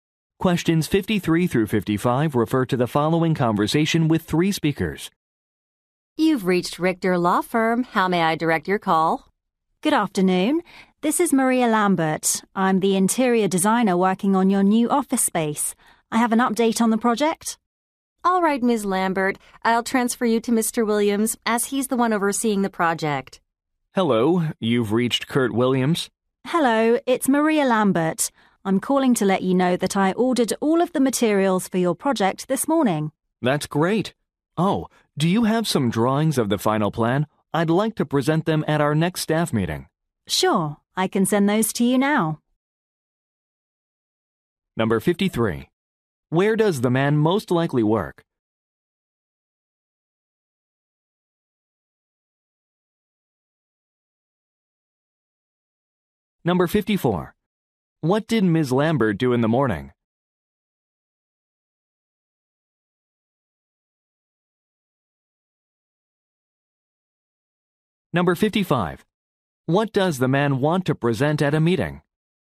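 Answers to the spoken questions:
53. At a law firm
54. Ordered materials
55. Drawings of the final plan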